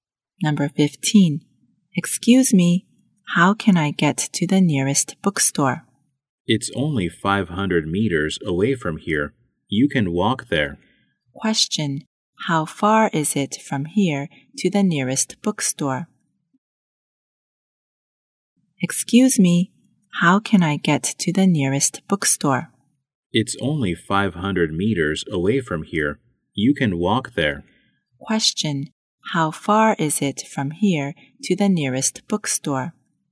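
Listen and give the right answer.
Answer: 500 meters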